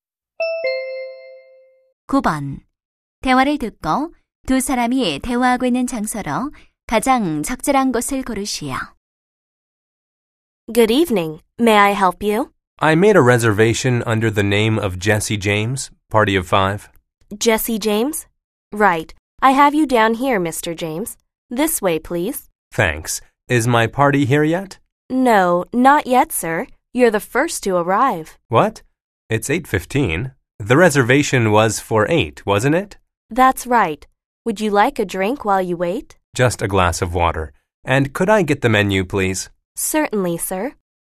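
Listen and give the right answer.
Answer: 식당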